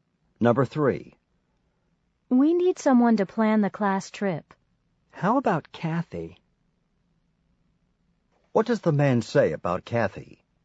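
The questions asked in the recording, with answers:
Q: What does the man say about Kathy?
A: She could plan the class trip.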